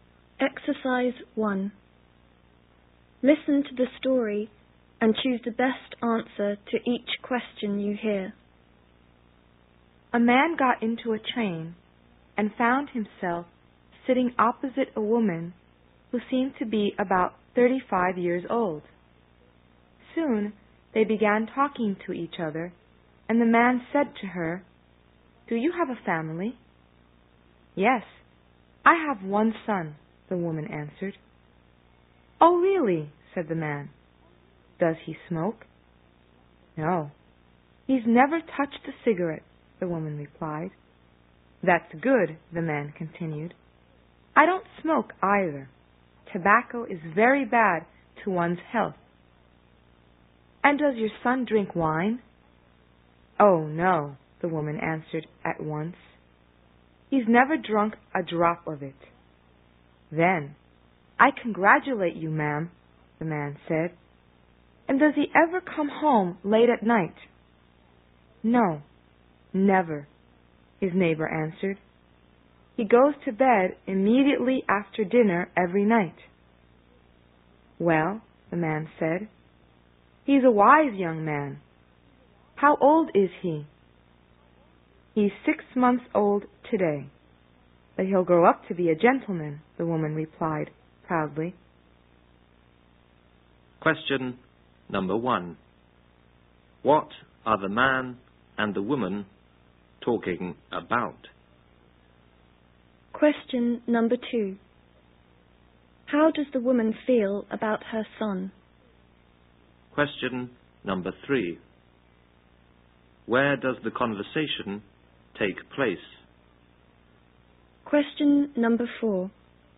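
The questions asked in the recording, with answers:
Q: What are the man and the woman talking about?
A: The woman's son

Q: How does the woman feel about her son?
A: She is proud of him

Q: Where does the conversation take place?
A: On a train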